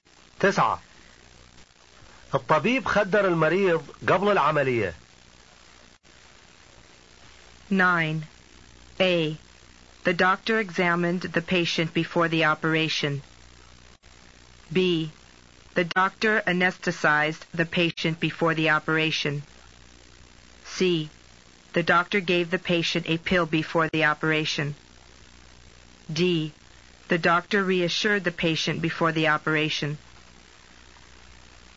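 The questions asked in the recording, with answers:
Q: الطبيب خدر المريض قبل العملية.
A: B: The doctor anesthetized the patient before the operation.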